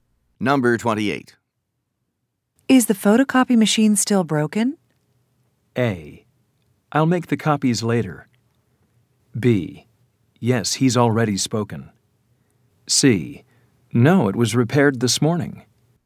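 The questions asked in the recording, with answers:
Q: Is the photocopy machine still broken?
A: C: No, it was repaired this morning.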